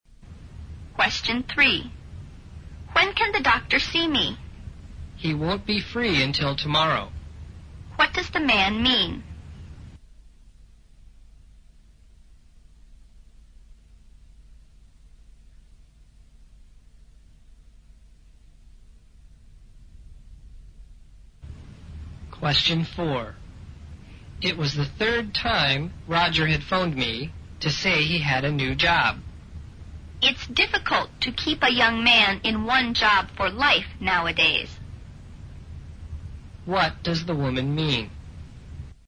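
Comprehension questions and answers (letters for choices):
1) Q: What does the man mean?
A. The doctor won't see her tomorrow.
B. The doctor is busy tomorrow.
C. The doctor is busy all day today.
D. The doctor will see her today.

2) Q: What does the woman mean?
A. Young people are too quick in making decisions.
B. Young people seldom stay long on the same job.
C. Young people lose their jobs easily.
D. Young people are too eager to succeed.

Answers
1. C
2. B

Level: 大学英语四级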